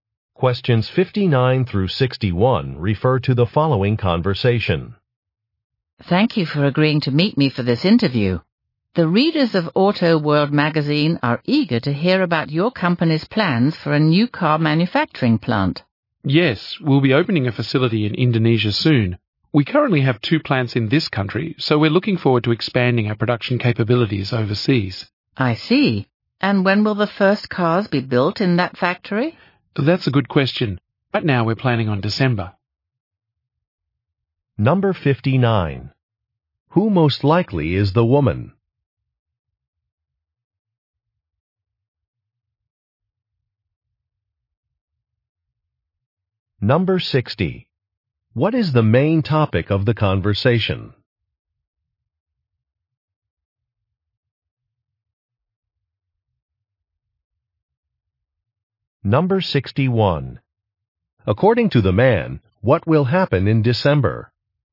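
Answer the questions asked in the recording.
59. A magazine journalist
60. A new car manufacturing plant
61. The first cars will be built at the new factory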